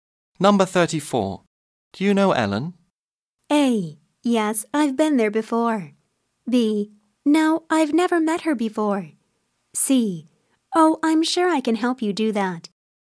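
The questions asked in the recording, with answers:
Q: Do you know Ellen?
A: B: No, I've never met her before.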